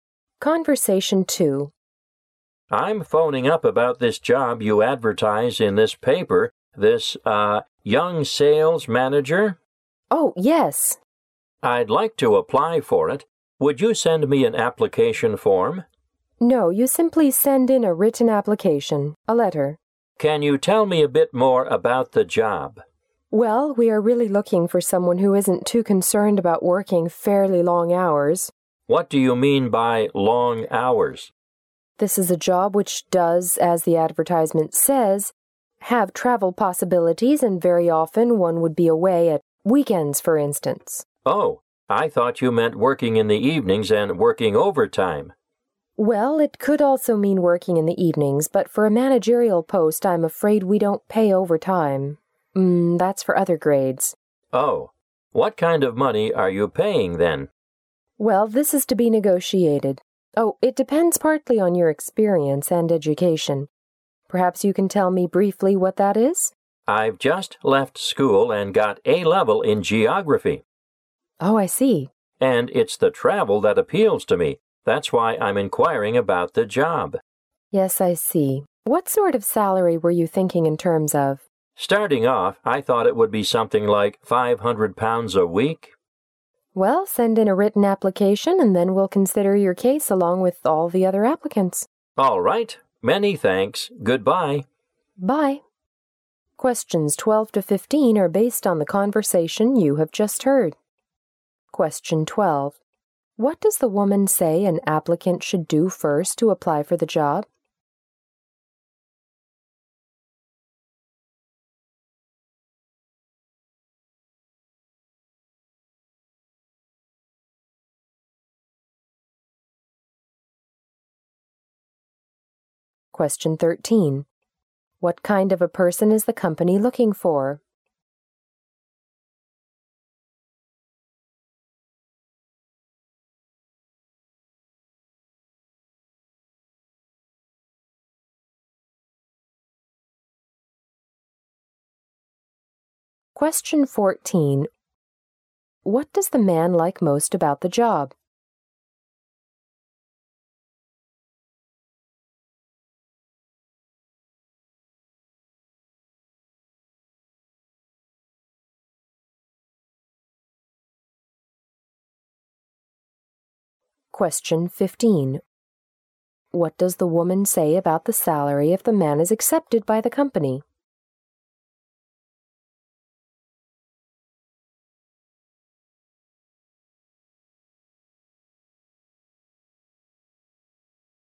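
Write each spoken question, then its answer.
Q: What does the woman say an applicant should do first to apply for the job?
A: Send in a written application (a letter)

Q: What kind of a person is the company looking for?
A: Someone who doesn't mind working long hours

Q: What does the man like most about the job?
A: The chance to travel

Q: What does the woman say about the salary if the man is accepted by the company?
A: It is to be negotiated and depends on experience and education.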